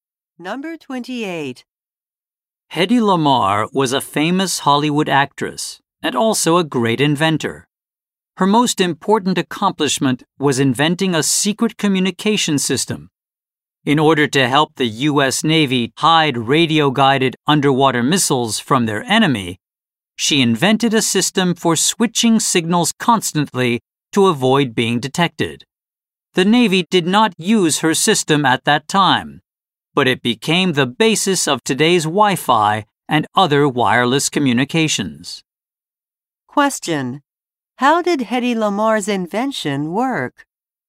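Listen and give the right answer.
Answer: By switching signals constantly to avoid detection.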